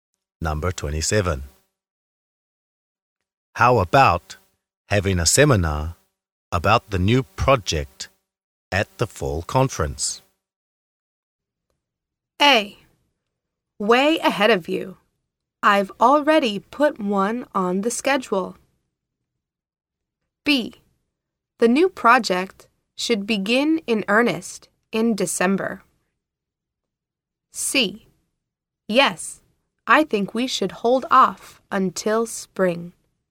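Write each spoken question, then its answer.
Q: How about having a seminar about the new project at the fall conference?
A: A: Way ahead of you. I've already put one on the schedule.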